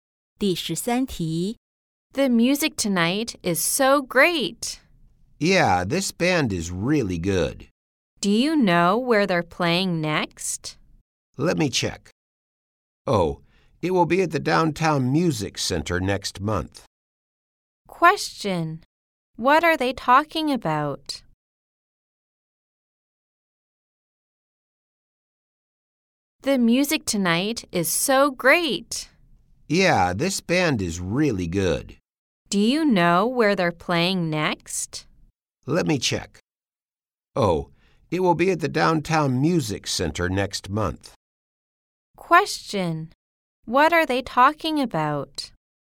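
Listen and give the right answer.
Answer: A band's music performance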